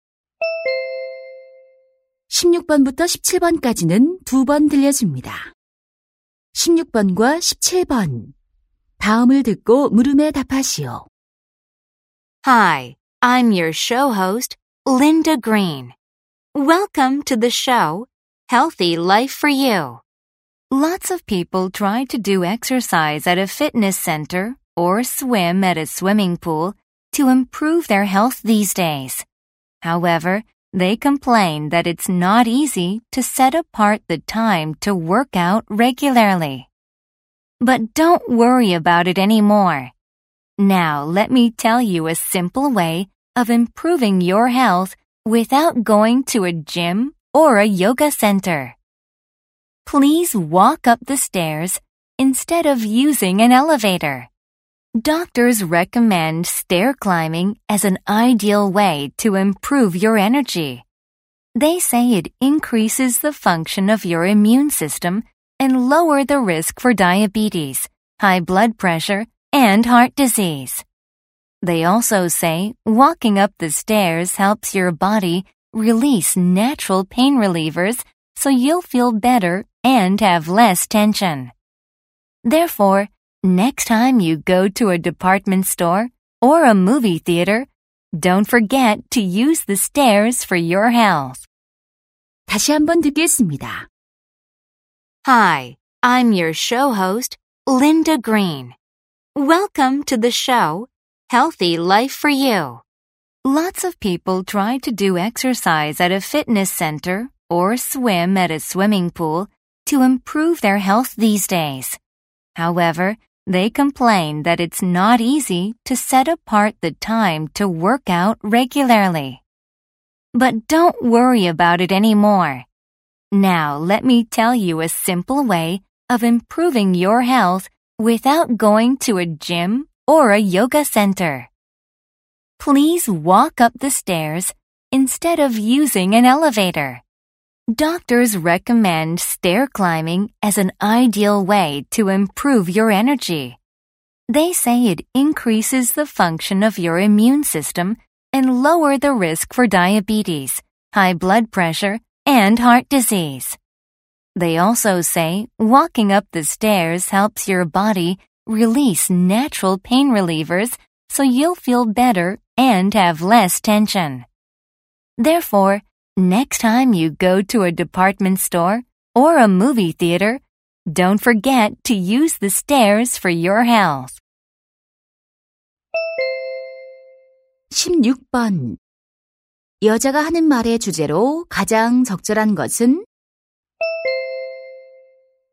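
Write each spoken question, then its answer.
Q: 여자가 하는 말의 주제로 가장 적절한 것은?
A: 계단 오르기의 건강상 이점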